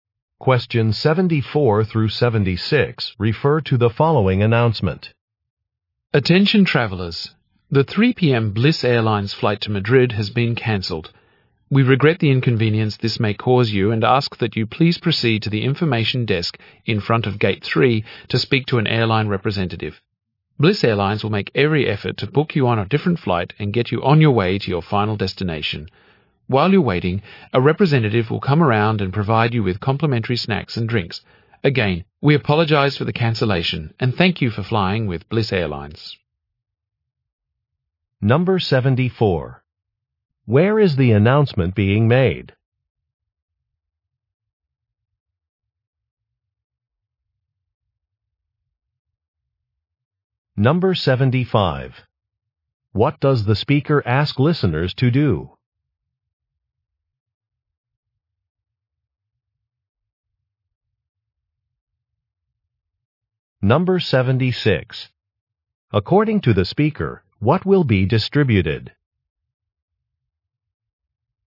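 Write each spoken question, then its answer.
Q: Where is the announcement being made?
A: At an airport

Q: What does the speaker ask listeners to do?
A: Go to the information desk by Gate 3

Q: According to the speaker, what will be distributed?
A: Free snacks and drinks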